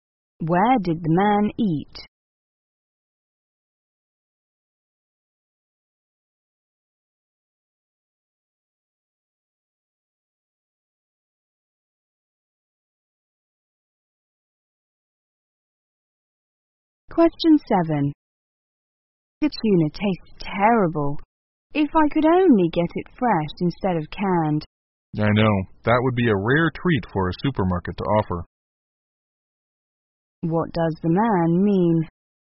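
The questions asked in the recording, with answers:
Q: What does the man mean?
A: Supermarkets rarely sell fresh tuna.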